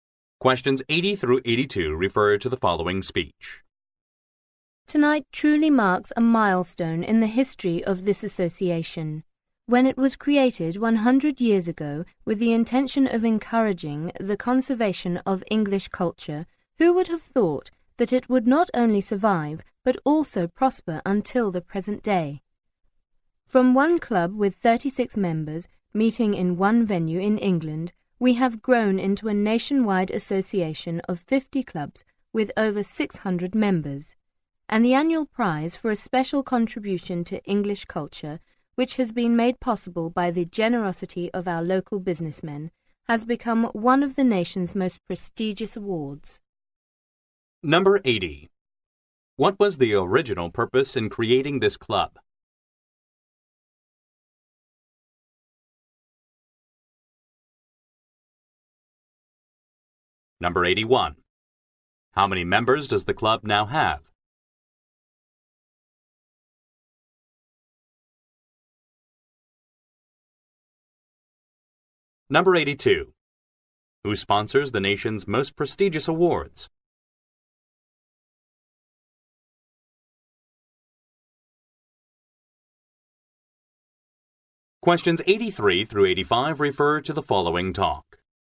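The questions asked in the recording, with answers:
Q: What was the original purpose in creating this club?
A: To encourage the conservation of English culture

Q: How many members does the club now have?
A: Over 600

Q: Who sponsors the nation's most prestigious awards?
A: Local businessmen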